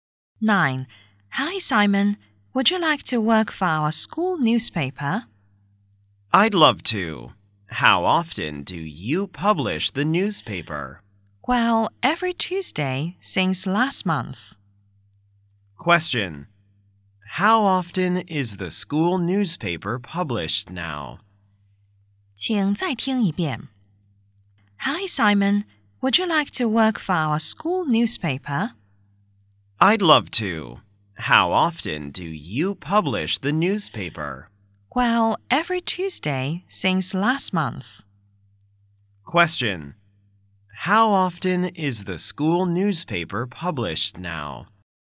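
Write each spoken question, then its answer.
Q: How often is the school newspaper published now?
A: Every Tuesday (once a week)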